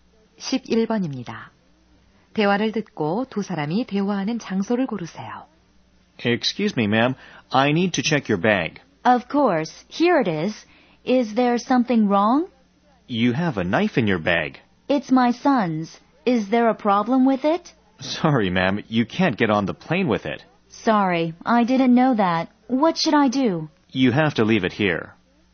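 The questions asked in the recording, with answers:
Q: 대화를 듣고 두 사람이 대화하는 장소를 고르세요.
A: 공항 보안 검색대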